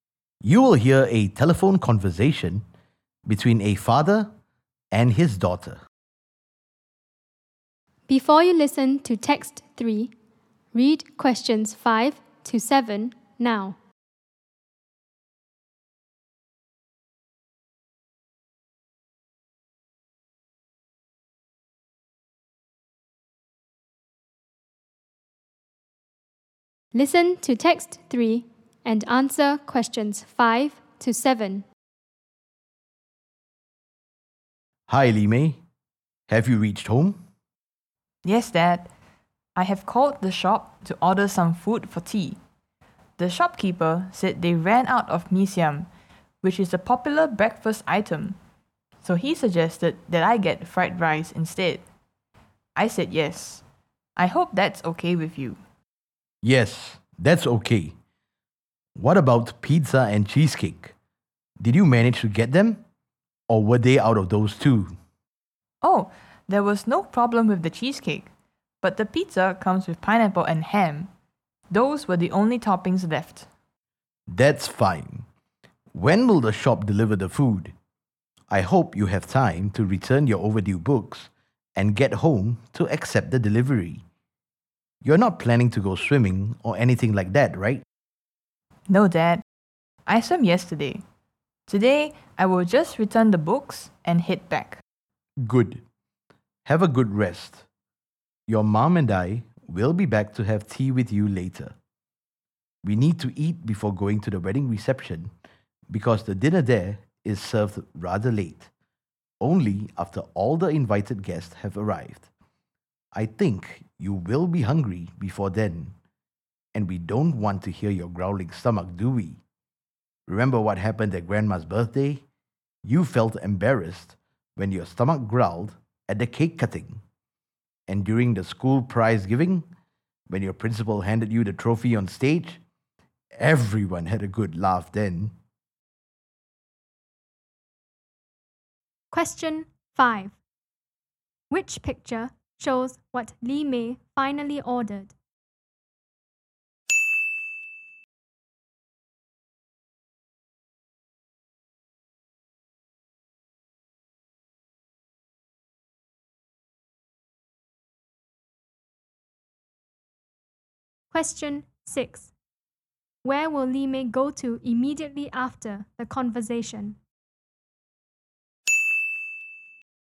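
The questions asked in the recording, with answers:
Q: Where will Li Mei go to immediately after the conversation?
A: To the library to return her overdue books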